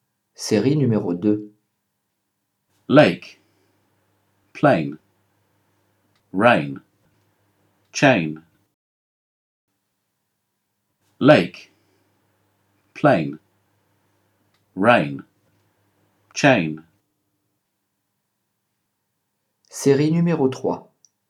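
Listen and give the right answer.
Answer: Lake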